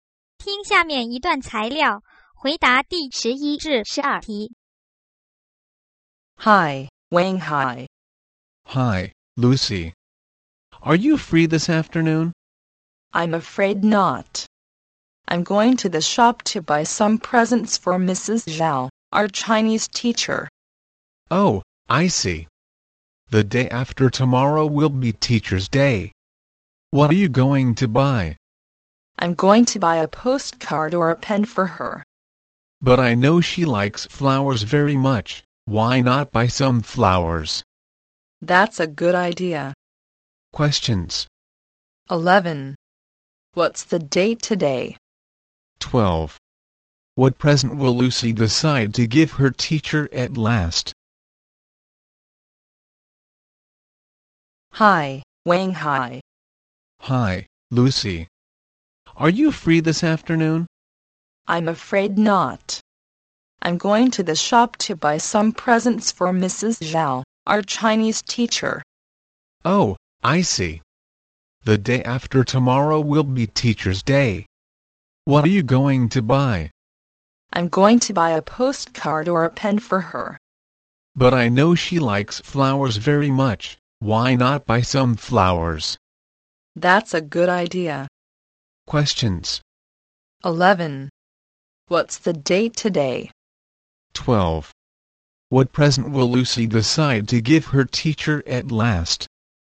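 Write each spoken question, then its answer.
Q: 12. What present will Lucy decide to give her teacher at last?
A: Flowers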